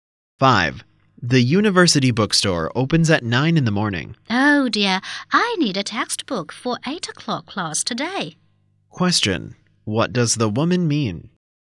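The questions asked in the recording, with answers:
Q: What does the woman mean?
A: She can't get the textbook in time for her 8 o'clock class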